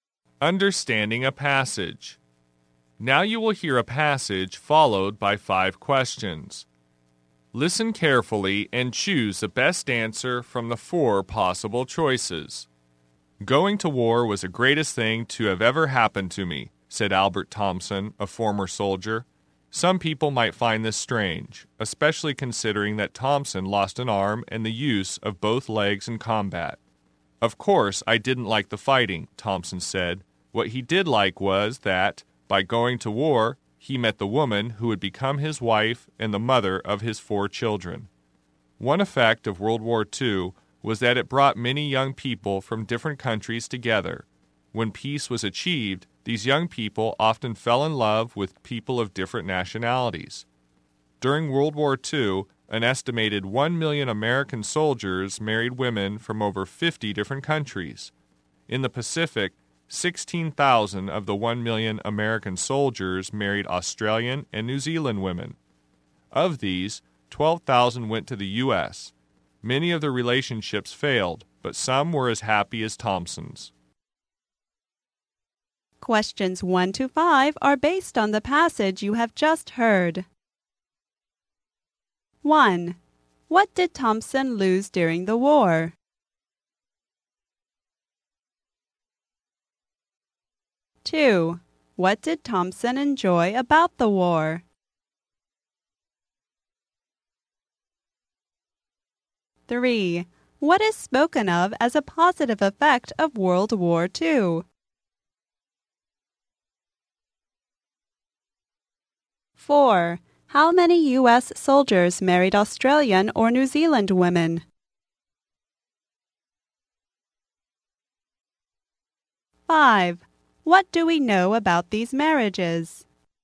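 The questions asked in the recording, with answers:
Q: What did Thompson lose during the war?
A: An arm and the use of both legs

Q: What did Thompson enjoy about the war?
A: He met the woman who became his wife

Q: What is spoken of as a positive effect of World War II?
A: It brought young people from different countries together

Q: How many U.S. soldiers married Australian or New Zealand women?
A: 16,000

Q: What do we know about these marriages?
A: Many failed, but some were happy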